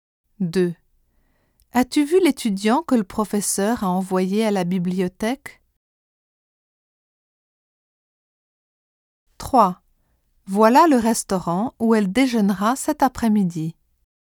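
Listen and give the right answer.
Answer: que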